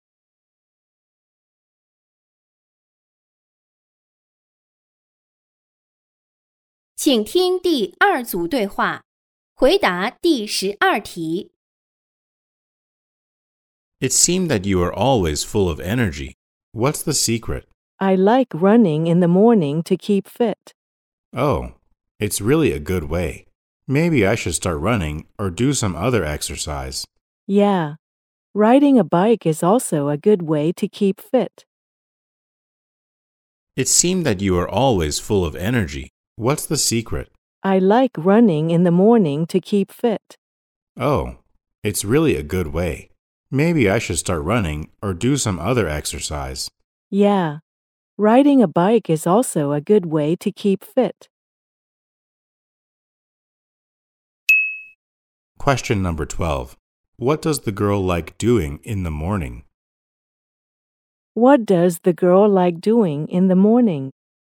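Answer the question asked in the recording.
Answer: Running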